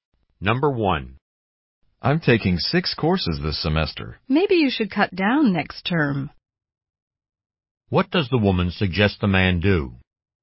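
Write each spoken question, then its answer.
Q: What does the woman suggest the man do?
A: Take fewer courses next term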